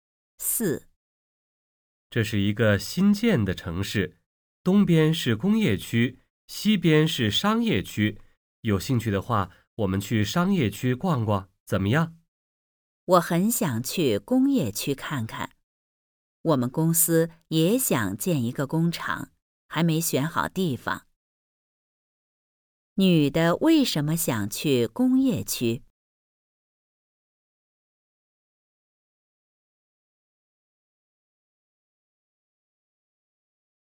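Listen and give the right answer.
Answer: 她们公司也想建一个工厂,还没选好地方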